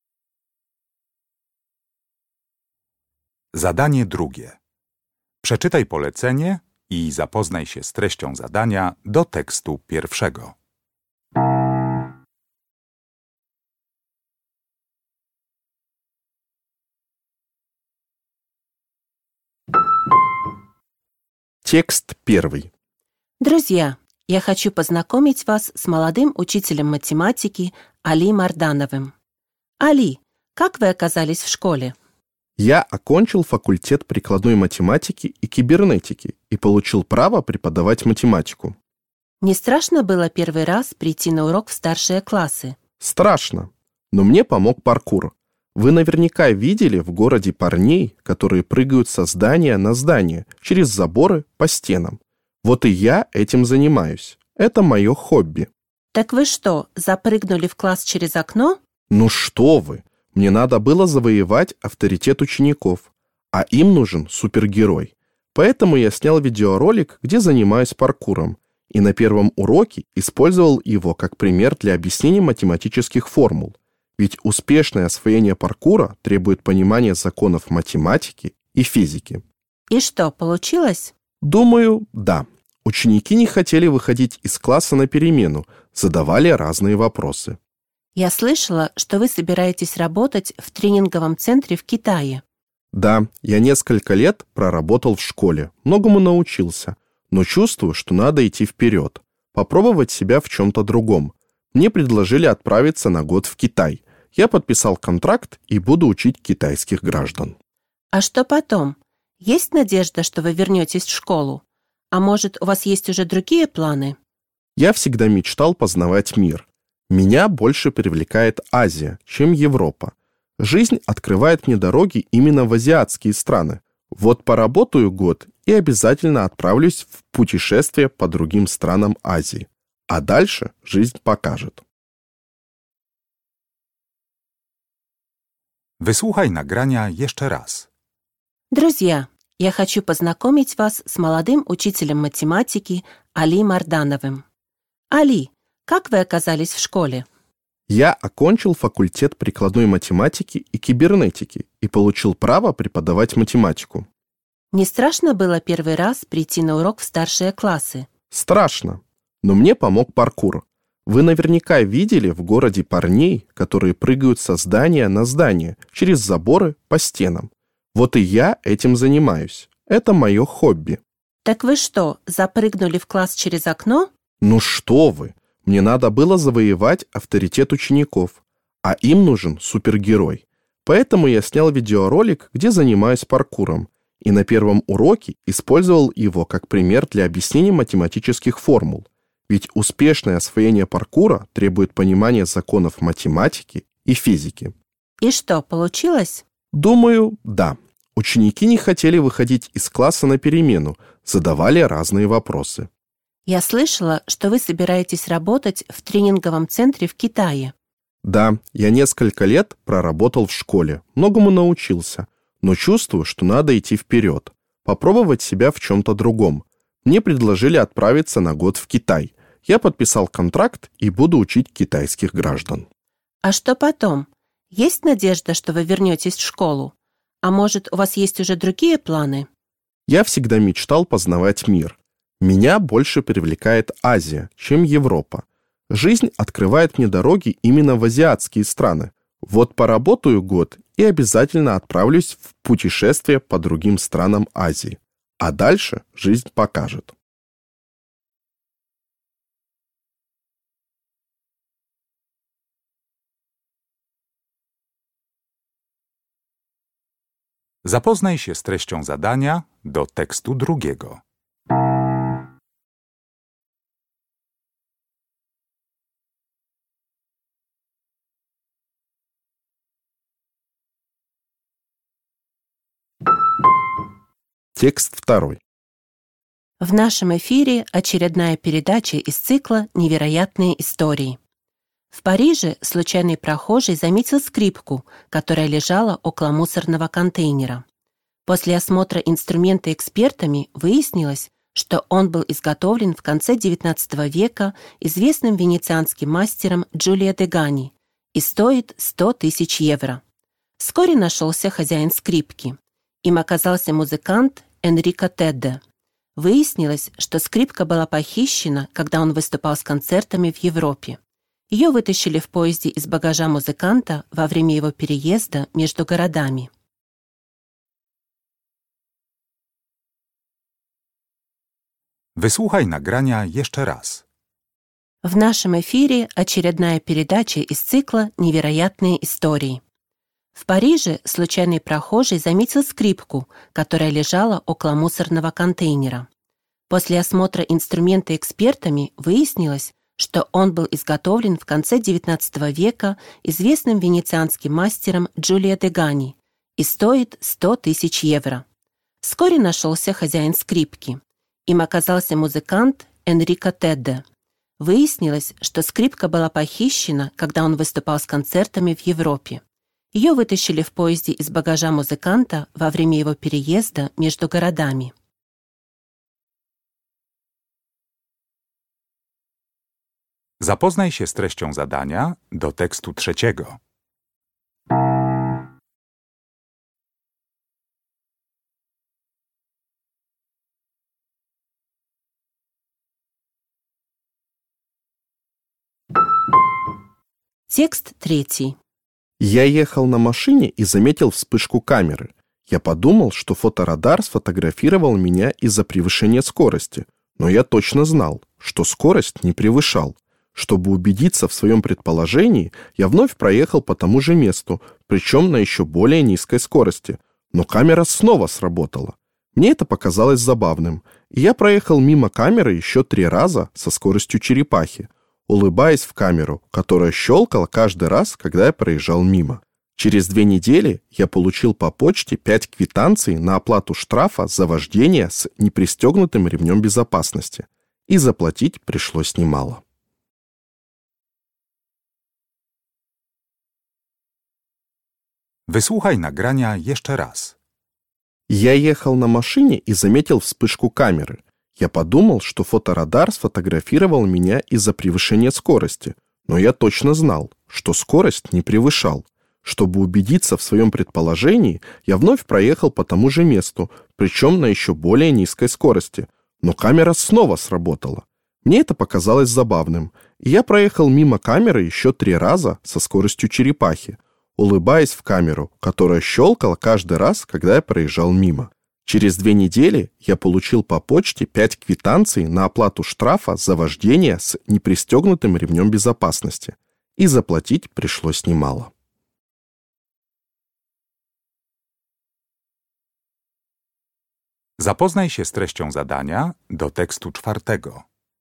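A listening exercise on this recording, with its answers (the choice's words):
Uruchamiając odtwarzacz z oryginalnym nagraniem CKE usłyszysz dwukrotnie cztery teksty. Z podanych odpowiedzi wybierz właściwą, zgodną z treścią nagrania. Zaznacz jedną z liter: A, B albo C.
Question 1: Чтобы завоевать авторитет учеников, Али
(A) вошёл в класс через окно.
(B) показал, как математика помогает ему в увлечении.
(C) рассказал, почему был в школе в костюме супергероя.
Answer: показал, как математика помогает ему в увлечении.

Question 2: После окончания работы в Китае мужчина хочет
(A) совершить поездку по Азии.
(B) вернуться на работу в школу.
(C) преподавать китайский язык в Европе.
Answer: совершить поездку по Азии.

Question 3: В этом тексте есть информация о том,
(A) кто украл драгоценную скрипку.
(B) в какой ситуации пропал инструмент.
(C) как музыкант отблагодарил прохожего за помощь.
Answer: в какой ситуации пропал инструмент.

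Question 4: Этот текст о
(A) сломанном фоторадаре.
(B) дорогом эксперименте.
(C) съёмках фильма.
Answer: дорогом эксперименте.

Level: Poziom: podstawowy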